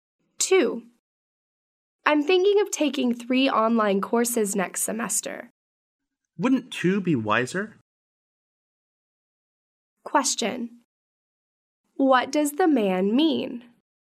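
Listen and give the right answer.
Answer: Taking two online courses would be wiser than three.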